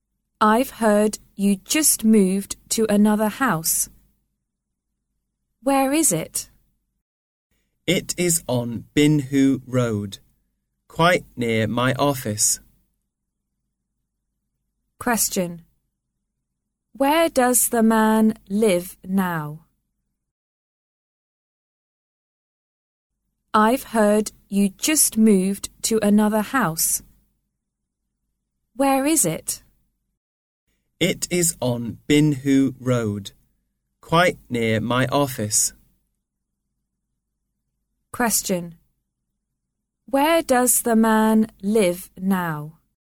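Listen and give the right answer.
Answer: On Binhu Road, near his office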